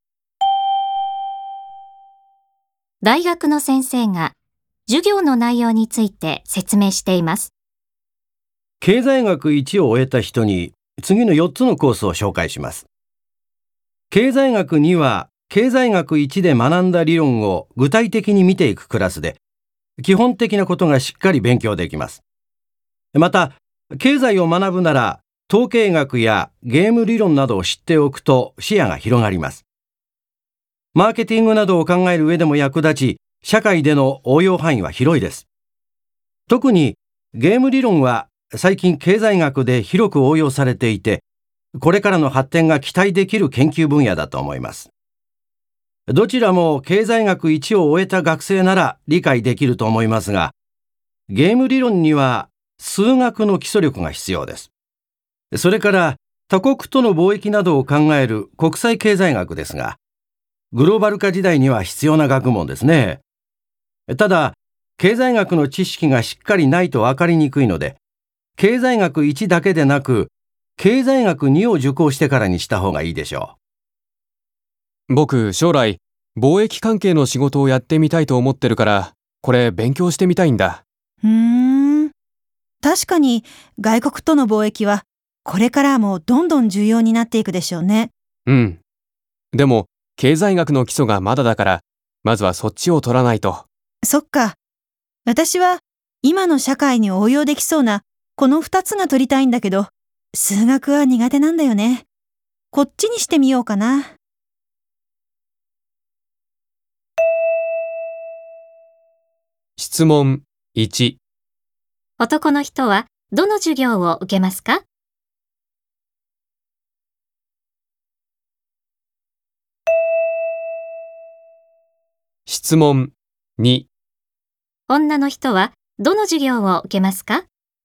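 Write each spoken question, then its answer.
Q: 男の人はどの授業を受けますか?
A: 経済学2

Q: 女の人はどの授業を受けますか?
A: 統計学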